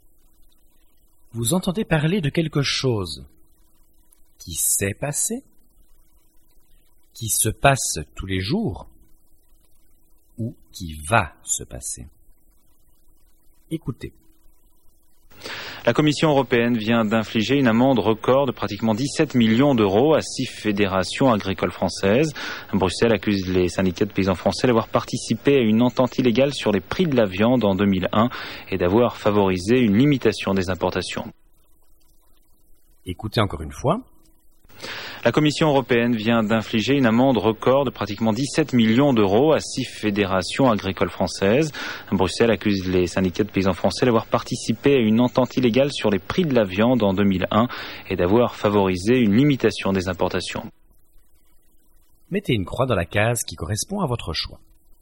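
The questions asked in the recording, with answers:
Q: Vous entendez parler de quelque chose qui s'est passé, qui se passe tous les jours ou qui va se passer.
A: qui s'est passé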